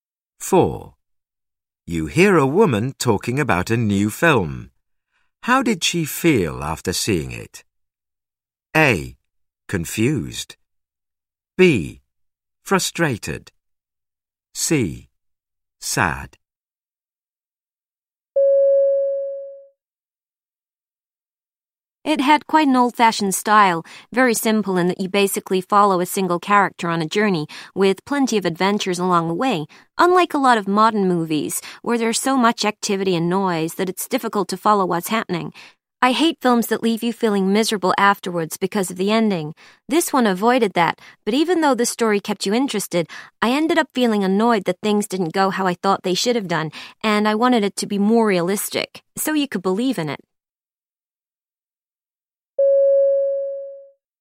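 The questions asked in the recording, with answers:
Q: How did she feel after seeing it?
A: B: Frustrated.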